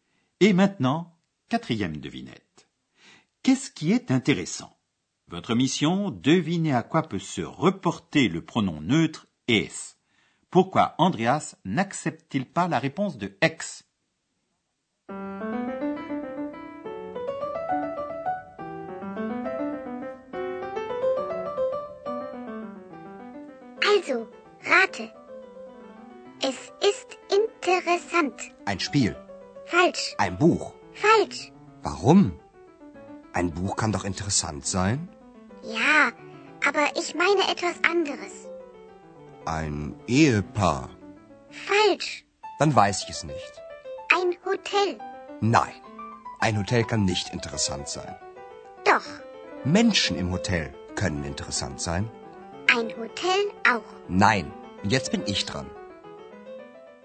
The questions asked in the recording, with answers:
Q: Votre mission, devinez à quoi peut se reporter le pronom neutre es.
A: Andreas devait deviner qu'un hôtel, c'est intéressant.